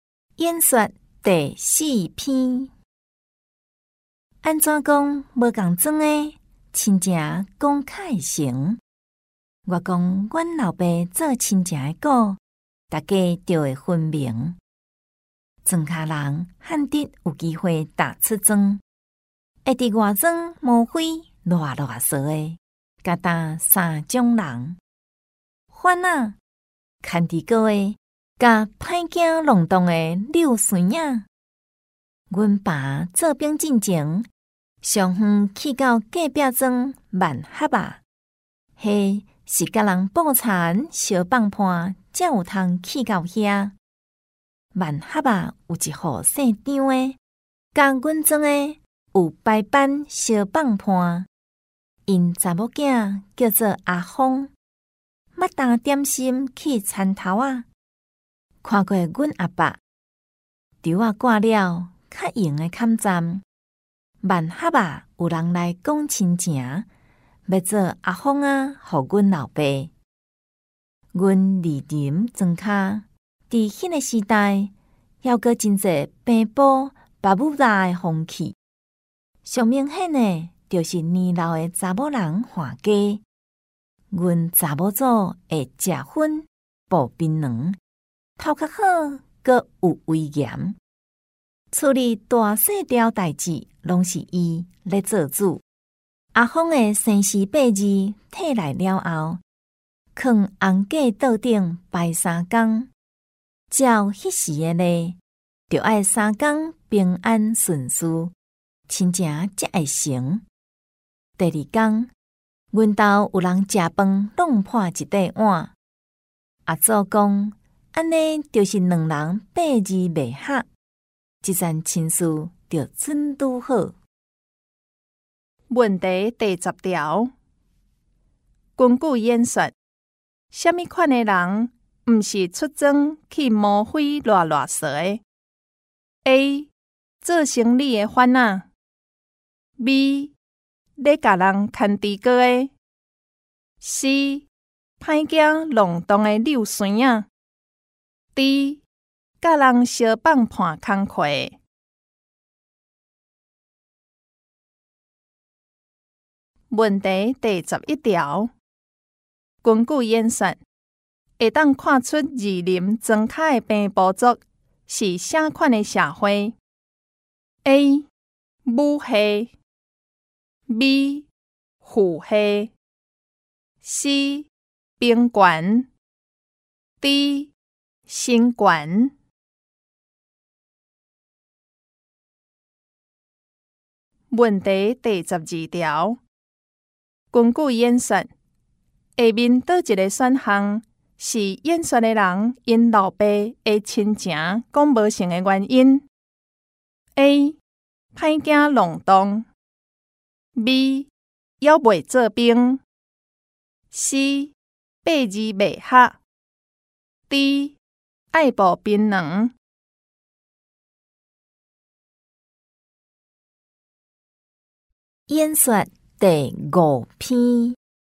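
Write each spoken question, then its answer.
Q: 根据演说,什么款的人不是出征去摸灰乱乱说的 ?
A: D: 甲人烧棒盘工课

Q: 根据演算,会当看出二林庄卡的平埔族是啥款的社会 ?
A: A: 母系

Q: 根据演算,下面哪一个选项是演算的人因老爸的亲情讲无成的原因 ?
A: C: 八字未合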